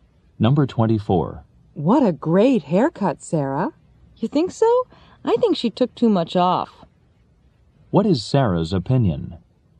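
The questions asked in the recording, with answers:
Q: What is Sarah's opinion?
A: Her hair was cut too short.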